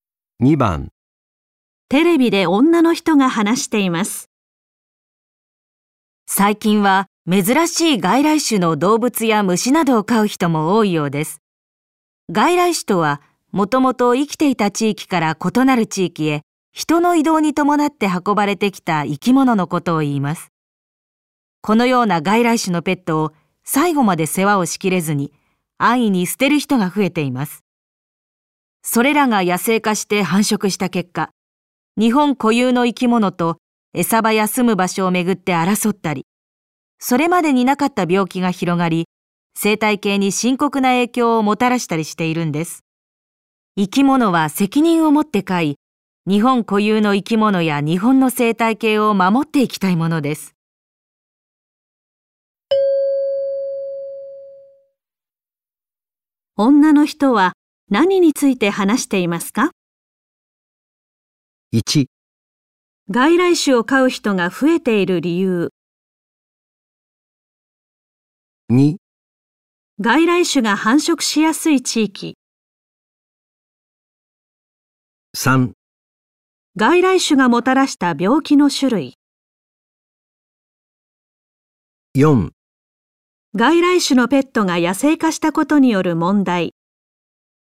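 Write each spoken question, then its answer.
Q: 女の人は、何について話していますか?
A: 4: 外来種のペットが野生化したことによる問題。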